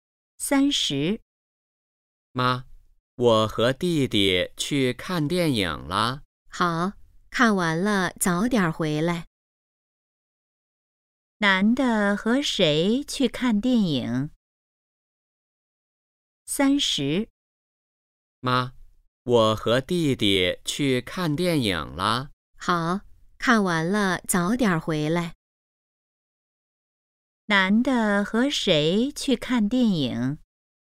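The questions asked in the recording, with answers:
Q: 男的和谁去看电影?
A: 弟弟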